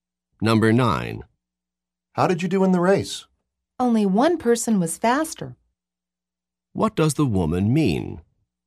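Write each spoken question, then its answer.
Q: What does the woman mean?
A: She came in second.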